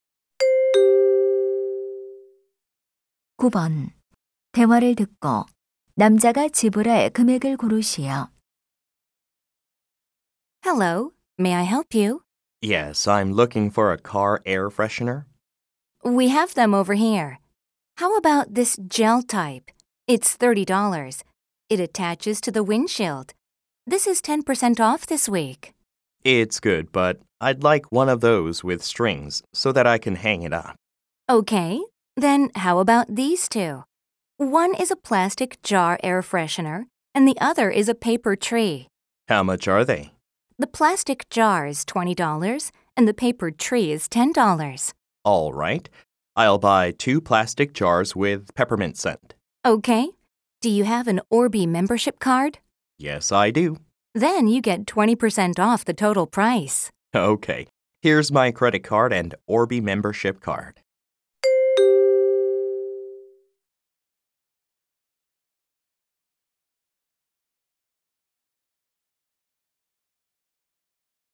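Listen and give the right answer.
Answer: $32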